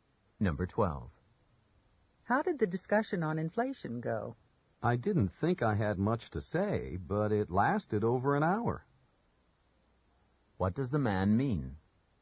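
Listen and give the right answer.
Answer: The discussion went on longer than expected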